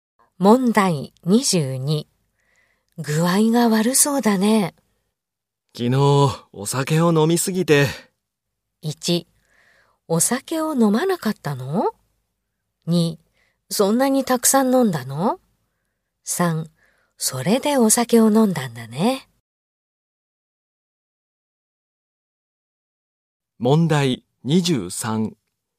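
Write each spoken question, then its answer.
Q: 具合が悪そうだね。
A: 2: そんなにたくさん飲んだの?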